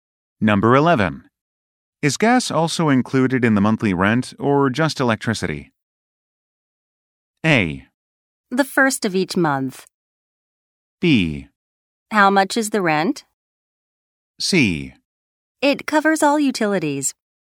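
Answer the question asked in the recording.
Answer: C: It covers all utilities.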